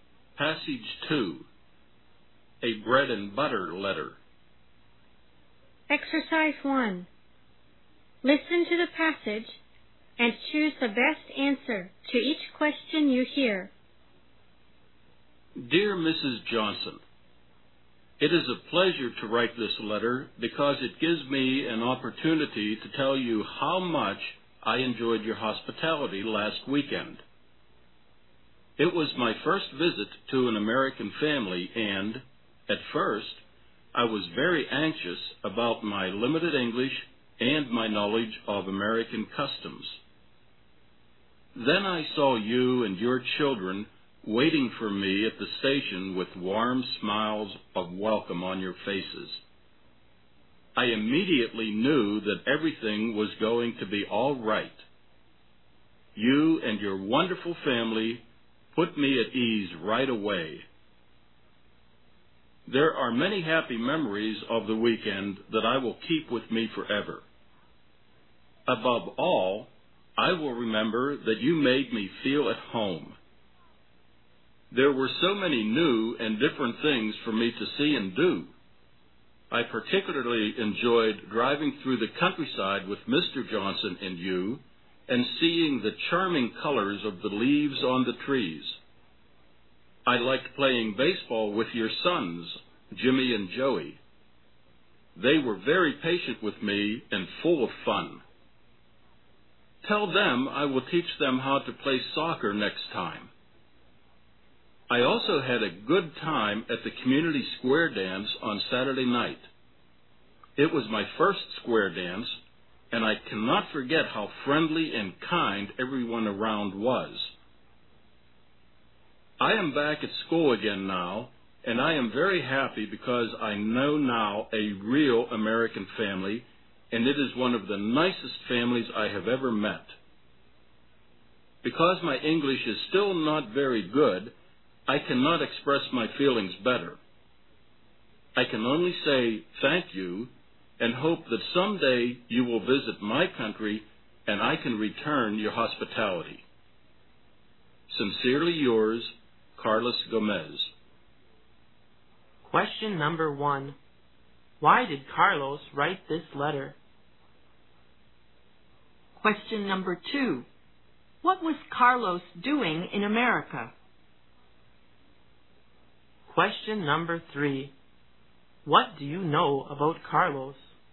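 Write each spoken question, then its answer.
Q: Why did Carlos write this letter?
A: To thank Mrs. Johnson for her hospitality last weekend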